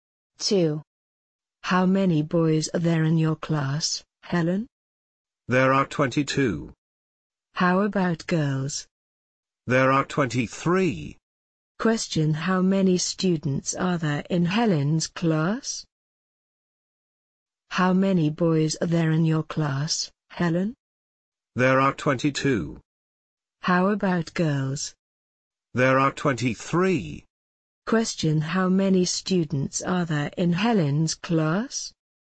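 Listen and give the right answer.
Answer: 45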